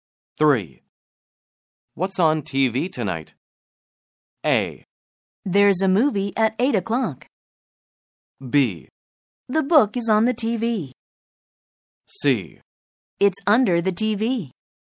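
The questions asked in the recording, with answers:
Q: What's on TV tonight?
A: A: There's a movie at 8 o'clock.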